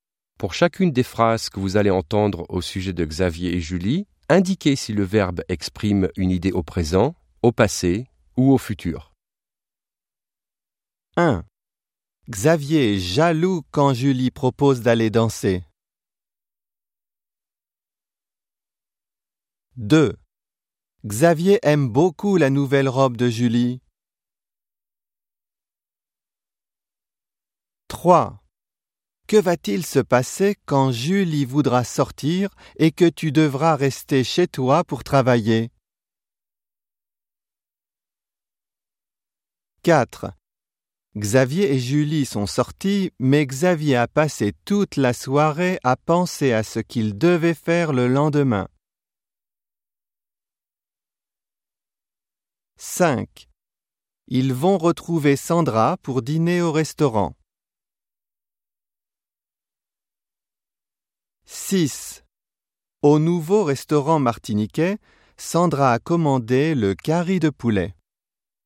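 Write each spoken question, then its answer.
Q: Xavier est jaloux quand Julie propose d'aller danser.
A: présent

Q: Xavier aime beaucoup la nouvelle robe de Julie.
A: présent

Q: Que va-t-il se passer quand Julie voudra sortir et que tu devras rester chez toi pour travailler?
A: futur

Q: Xavier et Julie sont sortis, mais Xavier a passé toute la soirée à penser à ce qu'il devait faire le lendemain.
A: passé

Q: Ils vont retrouver Sandra pour dîner au restaurant.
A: futur

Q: Au nouveau restaurant martiniquais, Sandra a commandé le curry de poulet.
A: passé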